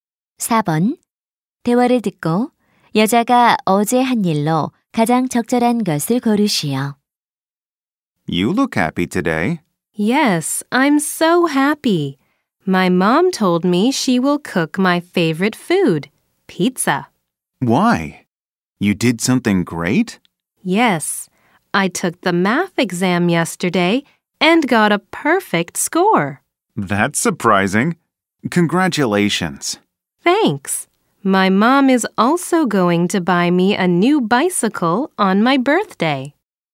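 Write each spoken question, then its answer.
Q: 대화를 듣고 여자가 어제 한 일로 가장 적절한 것을 고르시오.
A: 수학 시험을 봄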